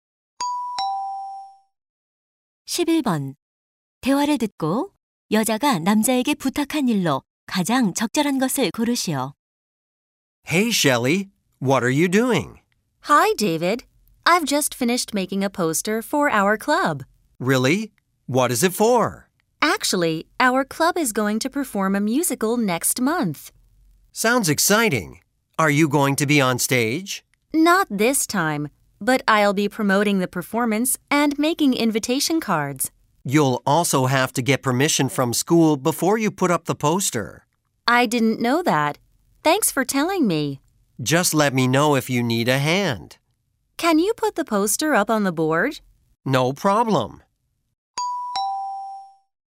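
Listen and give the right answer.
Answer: 게시판에 포스터 붙이기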